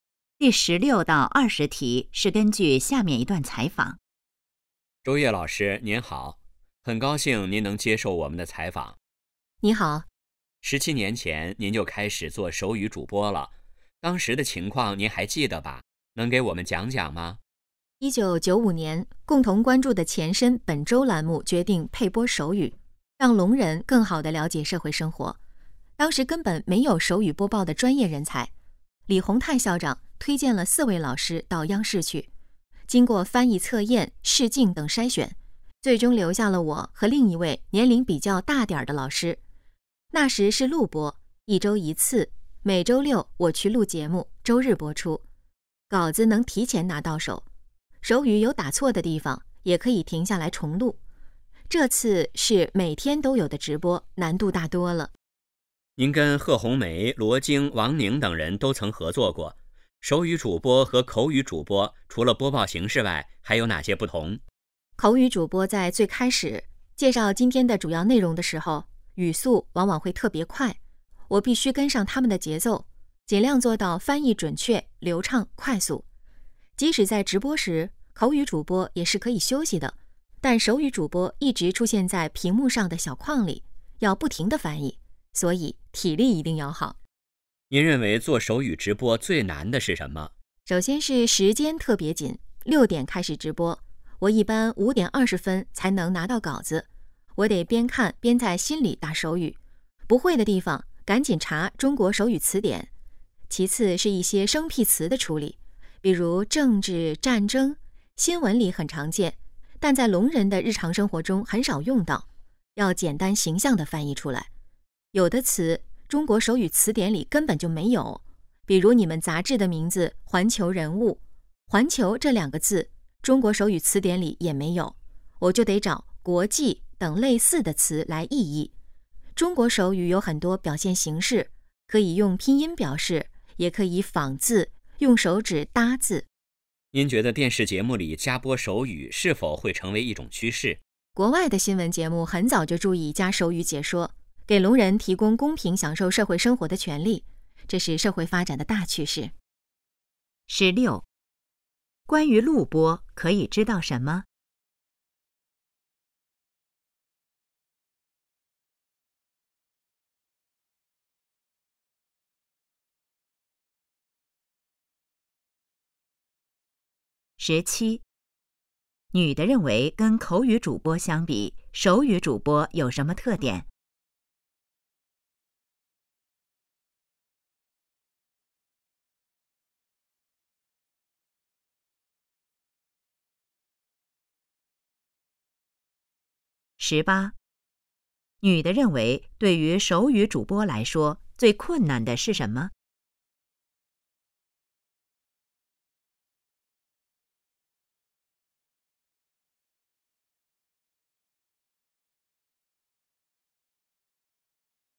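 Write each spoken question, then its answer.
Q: 遇到生僻字,女的会怎么处理?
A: 找类似的词来意译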